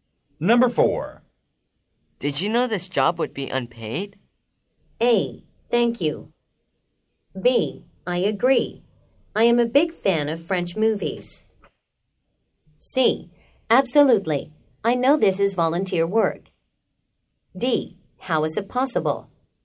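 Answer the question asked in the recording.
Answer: C: Absolutely. I know this is volunteer work.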